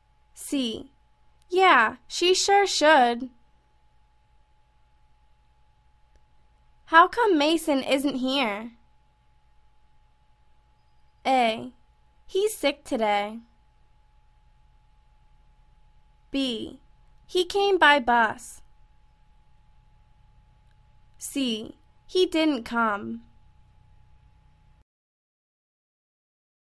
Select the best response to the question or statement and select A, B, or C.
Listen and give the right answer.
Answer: He's sick today.